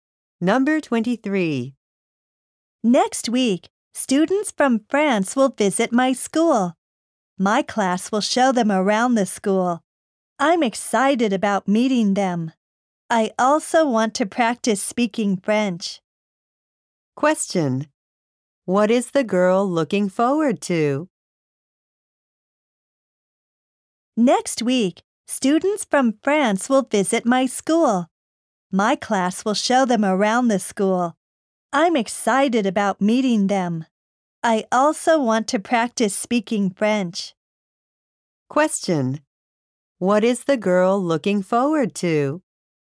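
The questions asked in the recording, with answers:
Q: What is the girl looking forward to?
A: Meeting students from France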